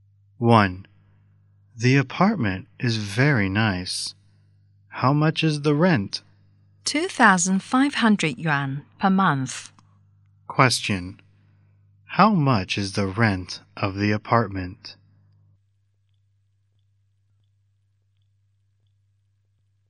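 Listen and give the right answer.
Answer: 2,500 yuan per month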